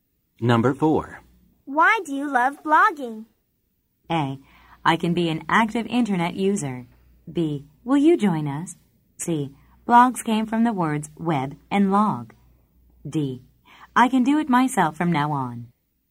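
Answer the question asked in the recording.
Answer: A: I can be an active internet user.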